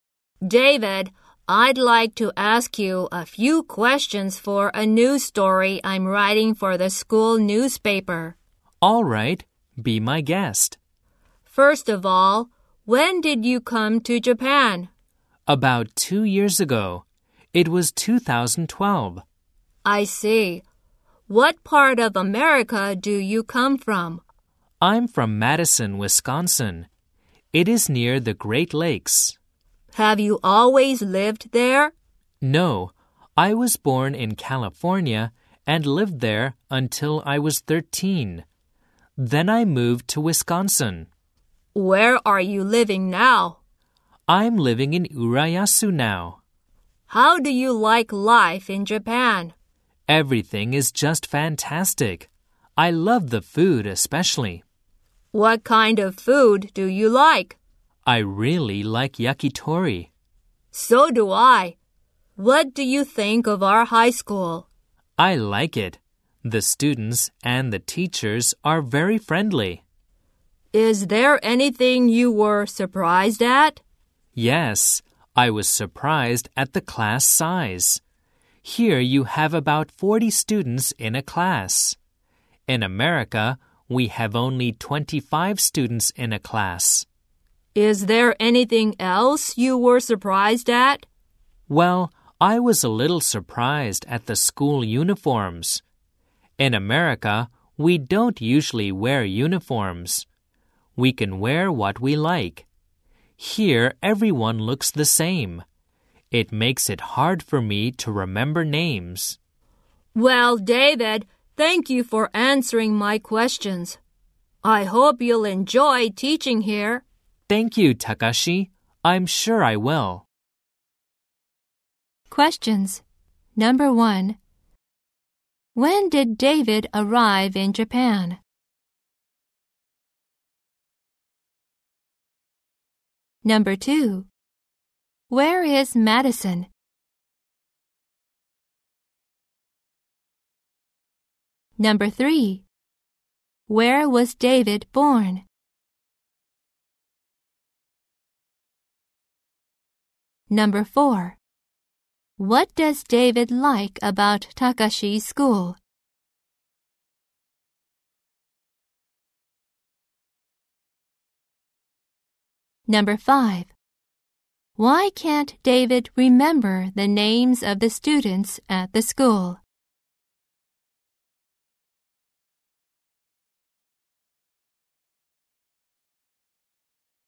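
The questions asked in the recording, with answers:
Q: When did David arrive in Japan?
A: In 2012, about 2 years ago

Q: Where is Madison?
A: In Wisconsin, near the Great Lakes

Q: Where was David born?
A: In California

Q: What does David like about Takashi's school?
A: The students and teachers are very friendly

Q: Why can't David remember the names of the students at the school?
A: Because everyone wears uniforms and looks the same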